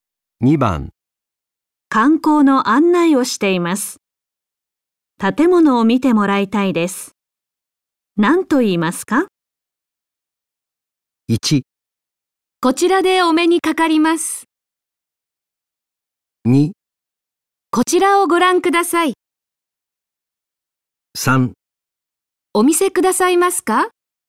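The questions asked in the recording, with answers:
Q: 観光の案内をしています。建物を見てもらいたいです。何と言いますか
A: 2: こちらをご覧ください。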